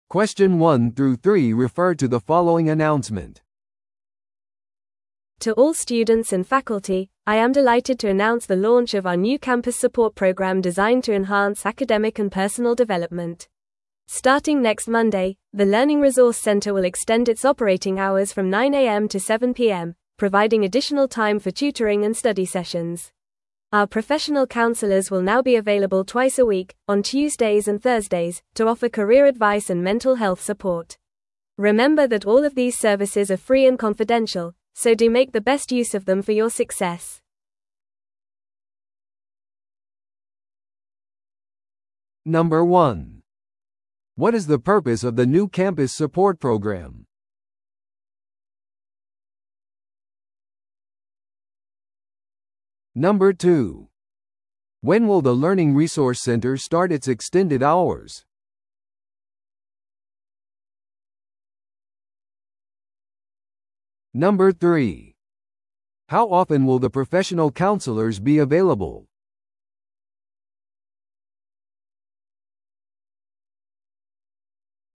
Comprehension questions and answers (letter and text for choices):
Listen to the audio below and answer the questions.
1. What is the purpose of the new campus support program?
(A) 教育資料のコスト削減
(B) 図書館の営業時間を延長する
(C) 学問的および個人的な成長を向上させる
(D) キャンパス規則を強化する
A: (C) 学問的および個人的な成長を向上させる

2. When will the Learning Resource Center start its extended hours?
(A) 今週の木曜日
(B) 来週の月曜日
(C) 2週間後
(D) 即時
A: (B) 来週の月曜日

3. How often will the professional counselors be available?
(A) 毎日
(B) 週に一度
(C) 週に二度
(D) 月に一度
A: (C) 週に二度

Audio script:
To all students and faculty, I am delighted to announce the launch of our new campus support program designed to enhance academic and personal development. Starting next Monday, the Learning Resource Center will extend its operating hours from 9am to 7pm, providing additional time for tutoring and study sessions. Our professional counselors will now be available twice a week, on Tuesdays and Thursdays, to offer career advice and mental health support. Remember that all of these services are free and confidential, so do make the best use of them for your success.